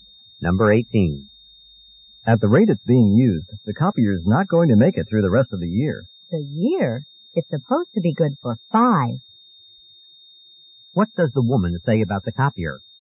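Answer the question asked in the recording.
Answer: It should last five years.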